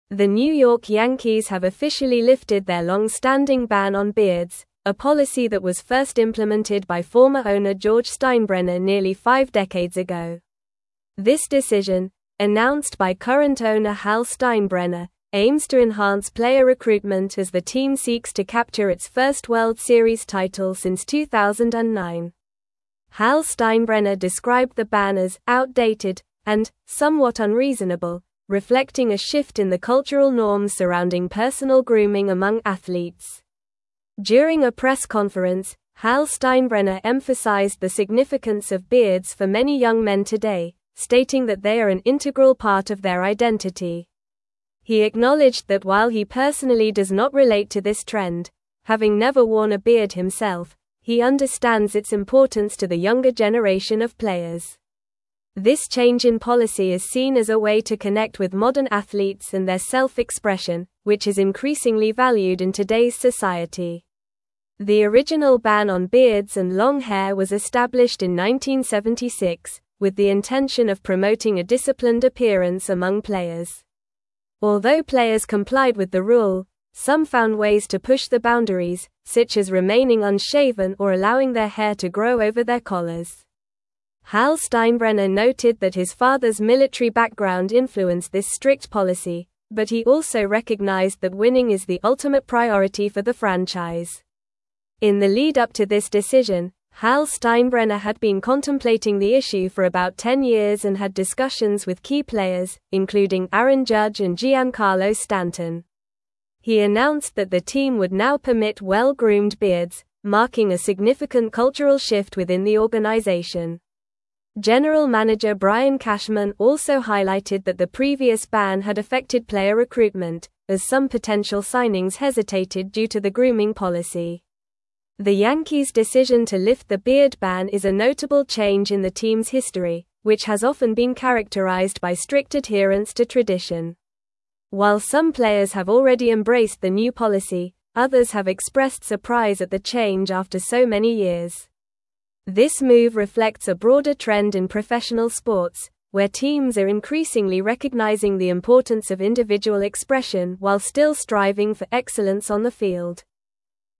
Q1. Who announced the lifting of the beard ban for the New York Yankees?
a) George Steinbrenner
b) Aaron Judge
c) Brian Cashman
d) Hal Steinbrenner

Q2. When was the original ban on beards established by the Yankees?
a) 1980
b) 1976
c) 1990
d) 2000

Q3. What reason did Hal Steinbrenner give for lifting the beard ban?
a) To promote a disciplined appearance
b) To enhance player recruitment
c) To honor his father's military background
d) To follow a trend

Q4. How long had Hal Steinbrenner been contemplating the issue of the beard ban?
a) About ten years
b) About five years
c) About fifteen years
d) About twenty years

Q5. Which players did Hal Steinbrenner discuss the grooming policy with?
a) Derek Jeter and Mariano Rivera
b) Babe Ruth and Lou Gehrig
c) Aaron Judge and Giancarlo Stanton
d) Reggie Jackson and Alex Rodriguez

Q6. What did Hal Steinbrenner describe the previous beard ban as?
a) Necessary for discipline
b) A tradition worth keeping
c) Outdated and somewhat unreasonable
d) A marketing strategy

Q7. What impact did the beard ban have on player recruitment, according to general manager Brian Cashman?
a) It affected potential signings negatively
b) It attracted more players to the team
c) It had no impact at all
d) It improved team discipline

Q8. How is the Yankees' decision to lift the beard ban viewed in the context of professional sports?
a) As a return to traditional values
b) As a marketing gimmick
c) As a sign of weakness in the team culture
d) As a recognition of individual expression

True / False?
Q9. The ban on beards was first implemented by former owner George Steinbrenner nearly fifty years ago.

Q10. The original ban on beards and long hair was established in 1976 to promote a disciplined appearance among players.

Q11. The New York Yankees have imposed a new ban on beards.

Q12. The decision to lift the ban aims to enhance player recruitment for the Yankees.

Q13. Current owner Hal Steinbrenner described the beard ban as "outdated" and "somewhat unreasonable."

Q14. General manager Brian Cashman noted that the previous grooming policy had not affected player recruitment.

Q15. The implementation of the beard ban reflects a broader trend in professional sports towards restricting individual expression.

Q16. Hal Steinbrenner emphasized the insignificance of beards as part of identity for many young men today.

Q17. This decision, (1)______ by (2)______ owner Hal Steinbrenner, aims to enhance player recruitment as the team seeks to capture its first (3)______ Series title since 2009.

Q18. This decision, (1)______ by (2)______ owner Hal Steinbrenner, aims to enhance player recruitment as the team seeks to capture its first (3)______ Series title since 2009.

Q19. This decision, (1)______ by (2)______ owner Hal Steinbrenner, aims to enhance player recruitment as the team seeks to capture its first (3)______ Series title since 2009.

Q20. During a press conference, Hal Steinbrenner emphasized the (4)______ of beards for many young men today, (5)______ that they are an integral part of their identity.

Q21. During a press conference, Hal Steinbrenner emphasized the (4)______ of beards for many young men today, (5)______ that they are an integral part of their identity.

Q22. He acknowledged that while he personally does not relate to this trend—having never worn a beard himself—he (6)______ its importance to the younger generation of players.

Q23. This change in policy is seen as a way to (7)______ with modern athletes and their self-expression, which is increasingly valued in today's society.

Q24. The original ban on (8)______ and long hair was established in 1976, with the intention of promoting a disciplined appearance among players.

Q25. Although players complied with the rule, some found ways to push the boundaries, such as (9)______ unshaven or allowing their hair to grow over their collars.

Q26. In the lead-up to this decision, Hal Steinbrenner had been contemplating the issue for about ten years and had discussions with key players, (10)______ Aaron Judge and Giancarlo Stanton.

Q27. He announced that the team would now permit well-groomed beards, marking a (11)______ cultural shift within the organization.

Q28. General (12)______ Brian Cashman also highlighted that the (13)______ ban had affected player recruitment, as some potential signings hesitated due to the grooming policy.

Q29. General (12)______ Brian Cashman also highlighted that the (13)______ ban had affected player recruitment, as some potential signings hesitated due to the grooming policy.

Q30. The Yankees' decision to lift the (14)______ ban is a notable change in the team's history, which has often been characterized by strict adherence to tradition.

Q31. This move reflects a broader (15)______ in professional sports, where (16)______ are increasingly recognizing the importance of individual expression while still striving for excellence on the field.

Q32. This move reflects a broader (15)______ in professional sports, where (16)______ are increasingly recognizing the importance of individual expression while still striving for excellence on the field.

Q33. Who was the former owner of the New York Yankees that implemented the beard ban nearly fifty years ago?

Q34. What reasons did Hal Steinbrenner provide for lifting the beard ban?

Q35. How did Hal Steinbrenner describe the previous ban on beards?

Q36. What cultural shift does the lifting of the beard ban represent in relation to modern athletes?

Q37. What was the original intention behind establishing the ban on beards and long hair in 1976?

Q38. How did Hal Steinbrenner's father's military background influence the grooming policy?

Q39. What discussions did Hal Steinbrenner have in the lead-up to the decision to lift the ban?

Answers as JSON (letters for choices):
{"1": "d", "2": "b", "3": "b", "4": "a", "5": "c", "6": "c", "7": "a", "8": "d", "9": "True", "10": "True", "11": "False", "12": "True", "13": "True", "14": "False", "15": "False", "16": "False", "17": "announced", "18": "current", "19": "World", "20": "significance", "21": "stating", "22": "understands", "23": "connect", "24": "beards", "25": "remaining", "26": "including", "27": "significant", "28": "manager", "29": "previous", "30": "beard", "31": "trend", "32": "teams", "33": "George Steinbrenner.", "34": "He described the ban as \"outdated\" and \"somewhat unreasonable,\" and emphasized the importance of beards as an integral part of identity for many young men today.", "35": "He described it as \"outdated\" and \"somewhat unreasonable.\"", "36": "It represents a shift towards valuing individual expression and personal grooming choices among athletes, reflecting changing cultural norms.", "37": "The original intention was to promote a disciplined appearance among players.", "38": "Hal Steinbrenner noted that his father's military background influenced the strict grooming policy that was in place.", "39": "He had discussions with key players, including Aaron Judge and Giancarlo Stanton."}

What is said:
The New York Yankees have officially lifted their long-standing ban on beards, a policy that was first implemented by former owner George Steinbrenner nearly five decades ago. This decision, announced by current owner Hal Steinbrenner, aims to enhance player recruitment as the team seeks to capture its first World Series title since 2009. Hal Steinbrenner described the ban as "outdated" and "somewhat unreasonable," reflecting a shift in the cultural norms surrounding personal grooming among athletes.
During a press conference, Hal Steinbrenner emphasized the significance of beards for many young men today, stating that they are an integral part of their identity. He acknowledged that while he personally does not relate to this trend—having never worn a beard himself—he understands its importance to the younger generation of players. This change in policy is seen as a way to connect with modern athletes and their self-expression, which is increasingly valued in today's society.
The original ban on beards and long hair was established in 1976, with the intention of promoting a disciplined appearance among players. Although players complied with the rule, some found ways to push the boundaries, such as remaining unshaven or allowing their hair to grow over their collars. Hal Steinbrenner noted that his father's military background influenced this strict policy, but he also recognized that winning is the ultimate priority for the franchise.
In the lead-up to this decision, Hal Steinbrenner had been contemplating the issue for about ten years and had discussions with key players, including Aaron Judge and Giancarlo Stanton. He announced that the team would now permit well-groomed beards, marking a significant cultural shift within the organization. General manager Brian Cashman also highlighted that the previous ban had affected player recruitment, as some potential signings hesitated due to the grooming policy.
The Yankees' decision to lift the beard ban is a notable change in the team's history, which has often been characterized by strict adherence to tradition. While some players have already embraced the new policy, others have expressed surprise at the change after so many years. This move reflects a broader trend in professional sports, where teams are increasingly recognizing the importance of individual expression while still striving for excellence on the field.

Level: Level 4